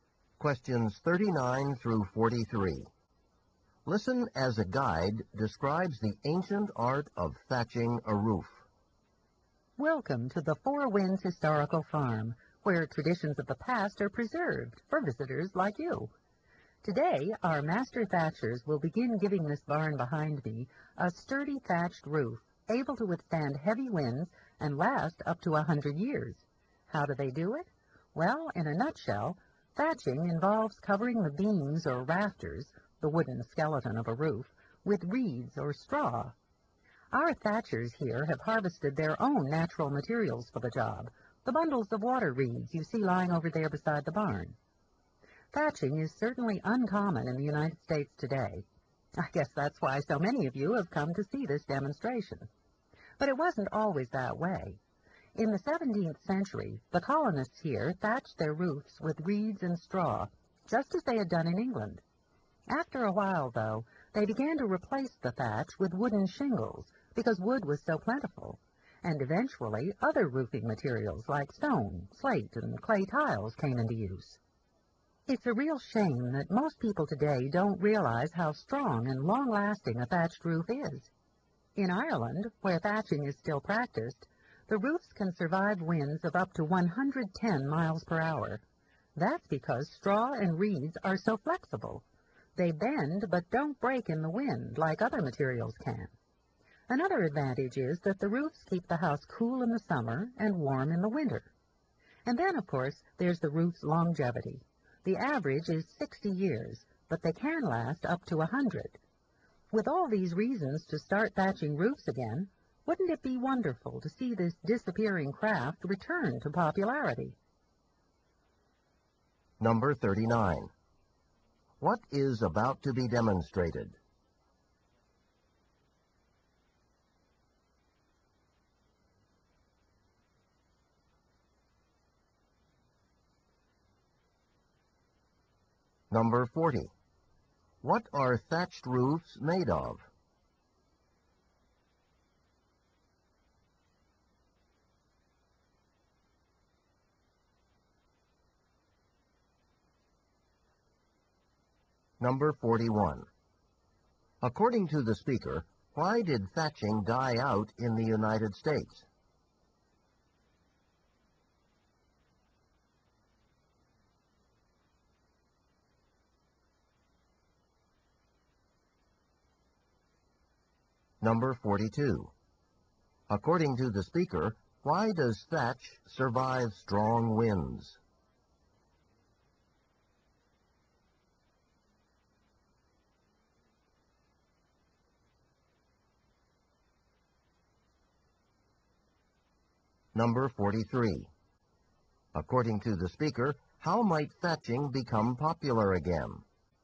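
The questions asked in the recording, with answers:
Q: What is about to be demonstrated?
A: Thatching a roof

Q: What are thatched roofs made of?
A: Reeds or straw

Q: According to the speaker, why did thatching die out in the United States?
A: Wood was plentiful, so wooden shingles replaced it

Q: According to the speaker, why does thatch survive strong winds?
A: Straw and reeds are flexible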